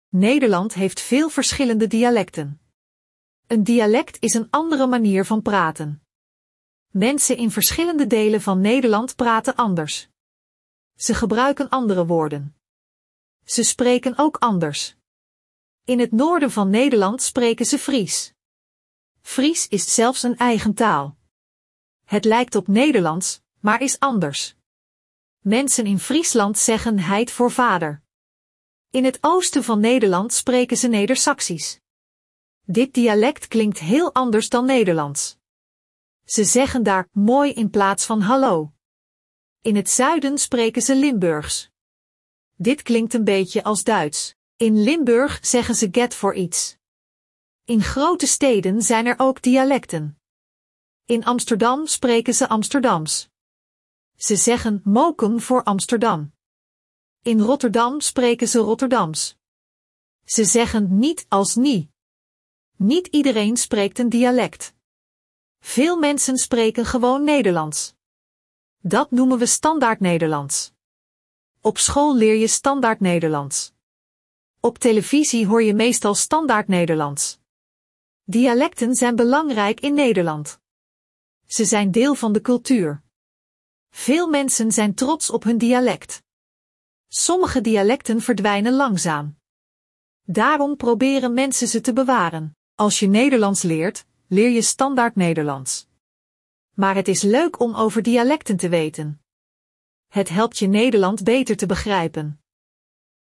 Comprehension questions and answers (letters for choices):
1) Wat is een dialect?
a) Een land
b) Een andere manier van praten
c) Een stad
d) Een school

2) Welk dialect spreken ze in het noorden van Nederland?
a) Limburgs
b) Fries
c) Amsterdams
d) Rotterdams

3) Wat zeggen ze in Limburg in plaats van "iets"?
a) Heit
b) Moi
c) Get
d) Mokum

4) Wat is Standaardnederlands?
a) Een dialect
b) De taal die je op school leert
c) De taal van Amsterdam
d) De taal van Friesland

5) Waarom zijn dialecten belangrijk in Nederland?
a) Ze zijn deel van de cultuur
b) Ze zijn makkelijk te leren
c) Iedereen spreekt een dialect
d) Ze klinken hetzelfde als Nederlands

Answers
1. b
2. b
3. c
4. b
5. a

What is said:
Nederland heeft veel verschillende dialecten. Een dialect is een andere manier van praten. Mensen in verschillende delen van Nederland praten anders. Ze gebruiken andere woorden. Ze spreken ook anders.
In het noorden van Nederland spreken ze Fries. Fries is zelfs een eigen taal. Het lijkt op Nederlands, maar is anders. Mensen in Friesland zeggen "heit" voor vader.
In het oosten van Nederland spreken ze Nedersaksisch. Dit dialect klinkt heel anders dan Nederlands. Ze zeggen daar "moi" in plaats van hallo.
In het zuiden spreken ze Limburgs. Dit klinkt een beetje als Duits. In Limburg zeggen ze "get" voor iets.
In grote steden zijn er ook dialecten. In Amsterdam spreken ze Amsterdams. Ze zeggen "mokum" voor Amsterdam. In Rotterdam spreken ze Rotterdams. Ze zeggen "niet" als "nie".
Niet iedereen spreekt een dialect. Veel mensen spreken gewoon Nederlands. Dat noemen we Standaardnederlands. Op school leer je Standaardnederlands. Op televisie hoor je meestal Standaardnederlands.
Dialecten zijn belangrijk in Nederland. Veel mensen zijn trots op hun dialect. Sommige dialecten verdwijnen langzaam. Daarom proberen mensen ze te bewaren.
Als je Nederlands leert, leer je Standaardnederlands. Maar het is leuk om over dialecten te weten. Het helpt je Nederland beter te begrijpen.

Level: A1-A2